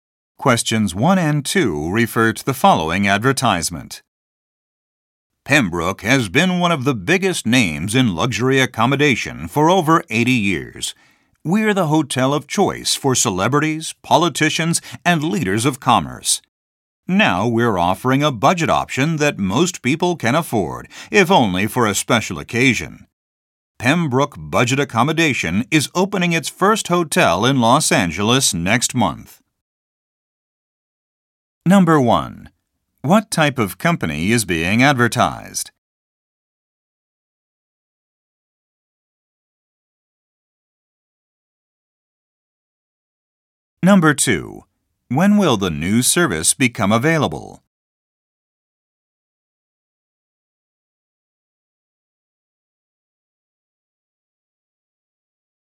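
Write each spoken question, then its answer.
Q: What type of company is being advertised?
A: A hotel

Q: When will the new service become available?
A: Next month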